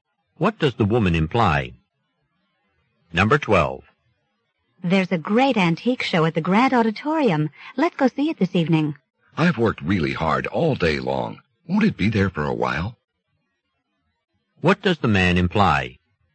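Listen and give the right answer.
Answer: He'd rather go another day because he is tired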